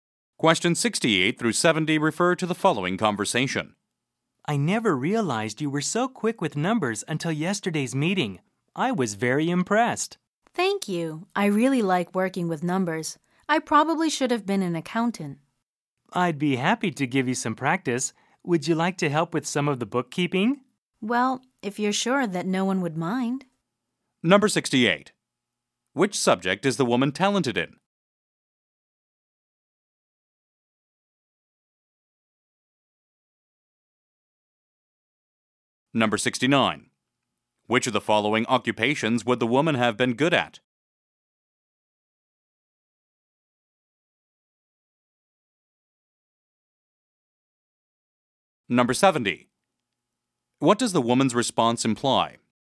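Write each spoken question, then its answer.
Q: Which subject is the woman talented in?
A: Numbers

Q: Which of the following occupations would the woman have been good at?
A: Accountant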